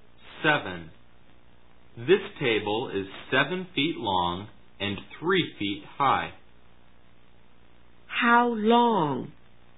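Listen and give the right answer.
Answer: 7 feet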